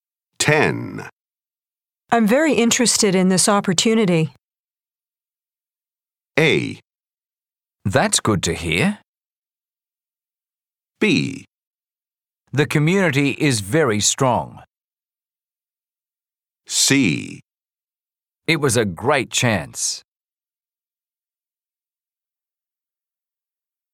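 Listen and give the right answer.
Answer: A: That's good to hear.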